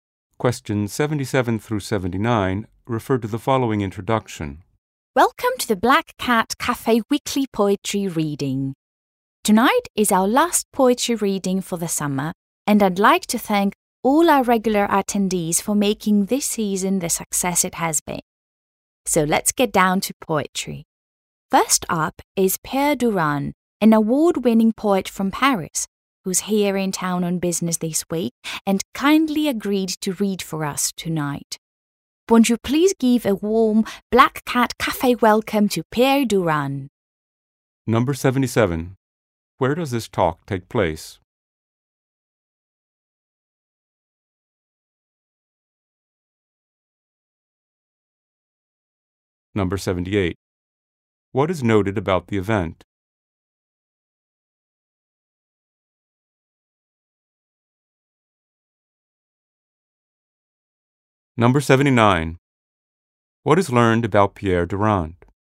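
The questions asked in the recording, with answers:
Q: Where does this talk take place?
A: At the Black Cat Cafe

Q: What is noted about the event?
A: It is the last poetry reading of the summer

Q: What is learned about Pierre Durand?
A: He is an award-winning poet from Paris in town on business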